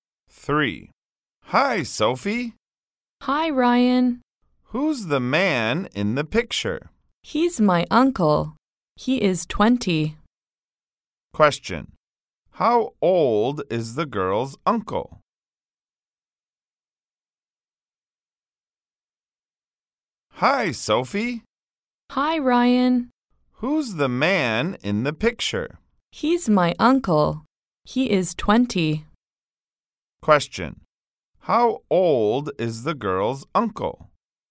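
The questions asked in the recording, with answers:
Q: How old is the girl's uncle?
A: 20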